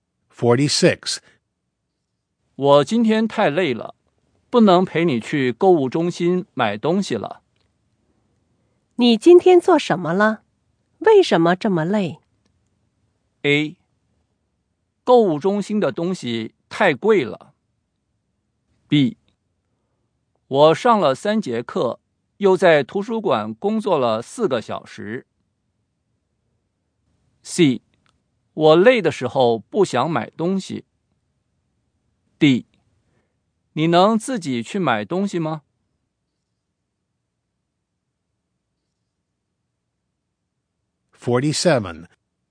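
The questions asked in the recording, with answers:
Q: 你今天做什么了?为什么这么累?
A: B: 我上了3节课,又在图书馆工作了4个小时。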